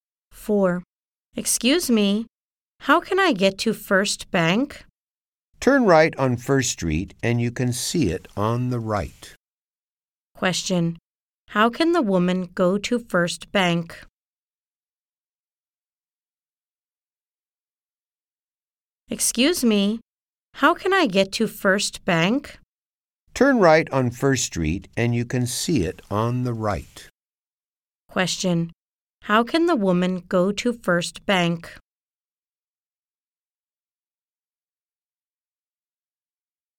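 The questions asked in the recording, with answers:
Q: How can the woman go to First Bank?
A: Turn right on First Street; it's on the right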